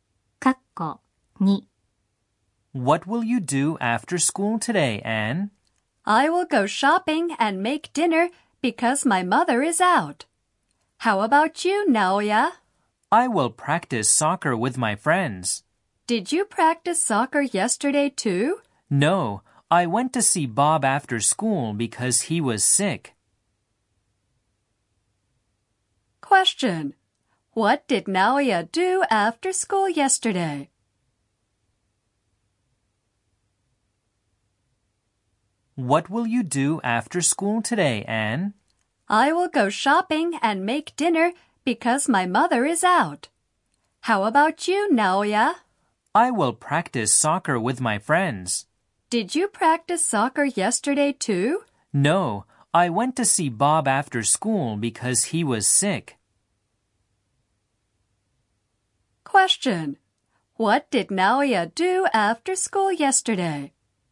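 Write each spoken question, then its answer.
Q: What did Naoya do after school yesterday?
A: He went to see Bob because Bob was sick.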